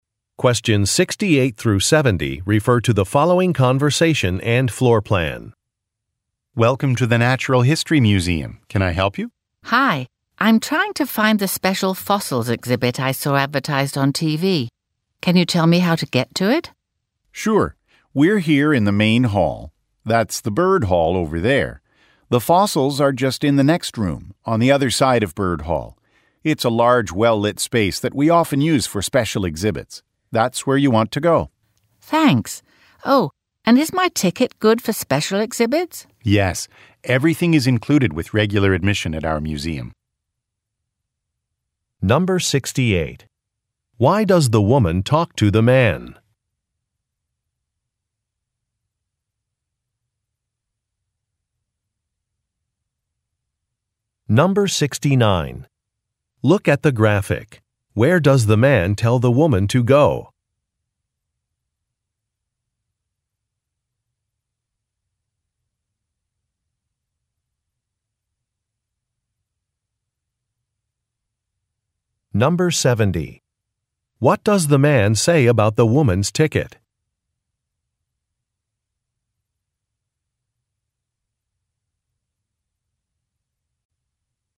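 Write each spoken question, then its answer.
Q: Why does the woman talk to the man?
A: To ask how to get to the special fossils exhibit

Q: What does the man say about the woman's ticket?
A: It is good for special exhibits; everything is included with regular admission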